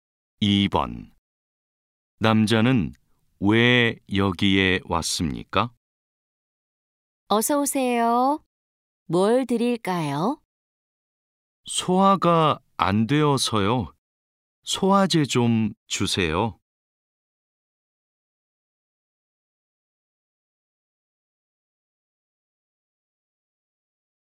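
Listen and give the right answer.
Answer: 소화가 안 되어서 소화제를 사러 왔습니다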